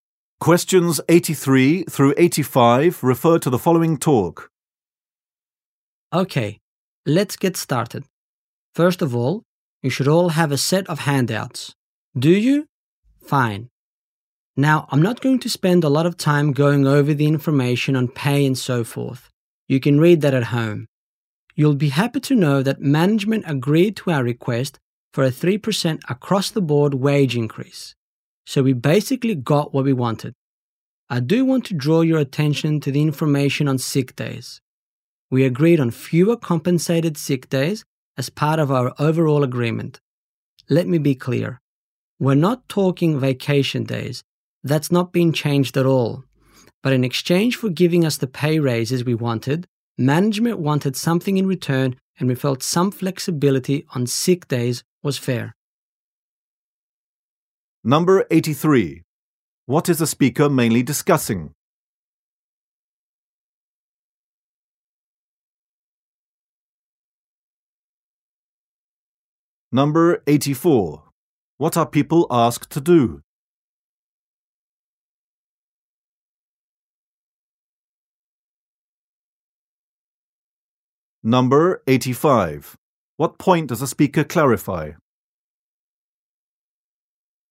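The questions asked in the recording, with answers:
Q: What is the speaker mainly discussing?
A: A new labor agreement with management

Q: What point does the speaker clarify?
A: Vacation days have not changed; only sick days were reduced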